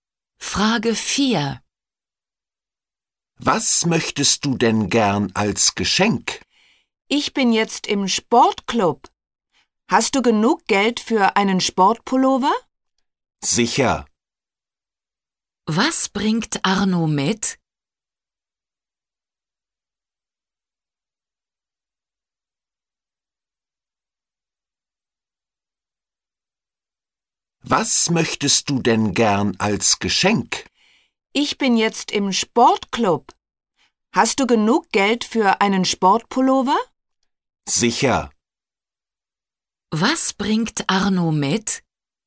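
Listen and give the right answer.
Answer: Einen Sportpullover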